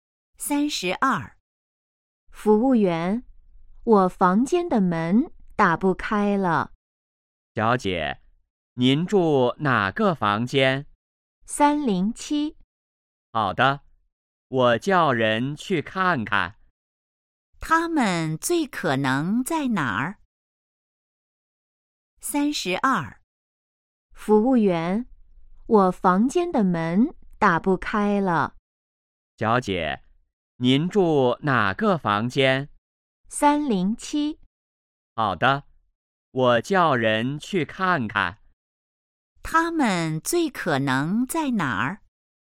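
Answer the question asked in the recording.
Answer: 宾馆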